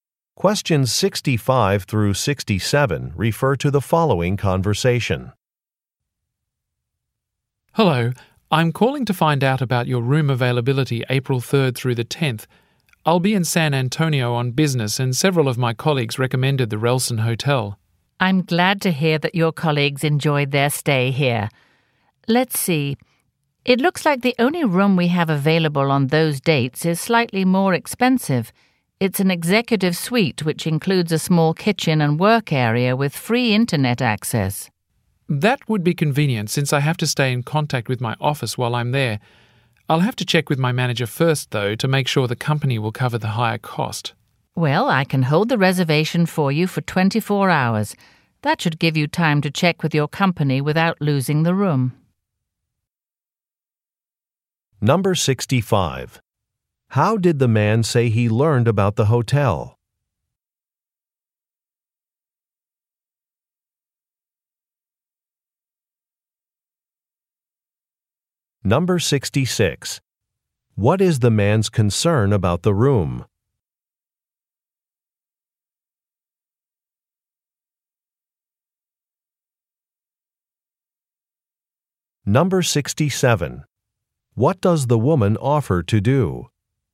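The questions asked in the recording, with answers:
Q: How did the man say he learned about the hotel?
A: From colleagues' recommendations

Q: What is the man's concern about the room?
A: It is more expensive

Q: What does the woman offer to do?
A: Hold the reservation for 24 hours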